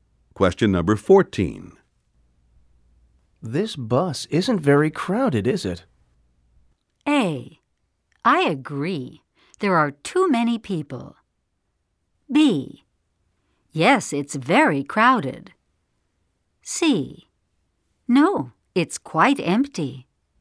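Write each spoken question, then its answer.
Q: This bus isn't very crowded, is it?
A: C: No, it's quite empty.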